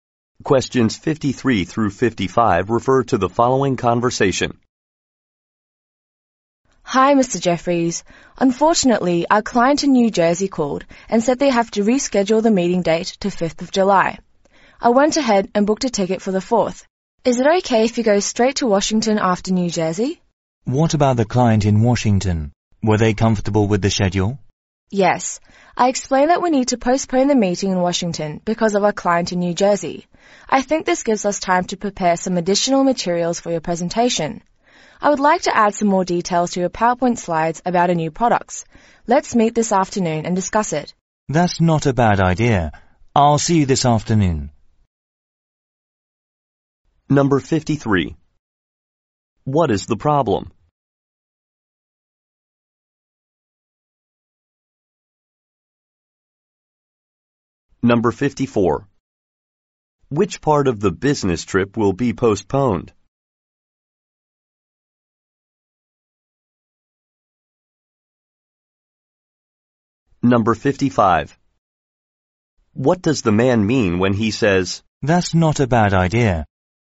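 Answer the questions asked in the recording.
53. The New Jersey client rescheduled the meeting
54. The Washington meeting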